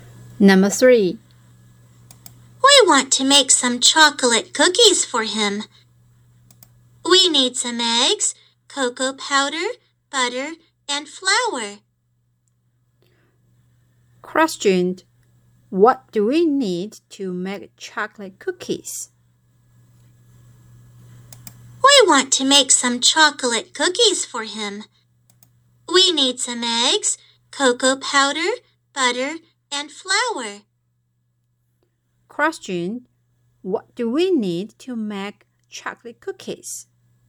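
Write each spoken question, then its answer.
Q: Question. What do we need to make chocolate cookies?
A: Eggs, cocoa powder, butter, and flour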